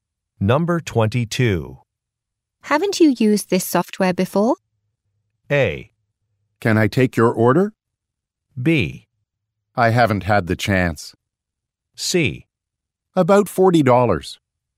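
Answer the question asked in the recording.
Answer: B: I haven't had the chance.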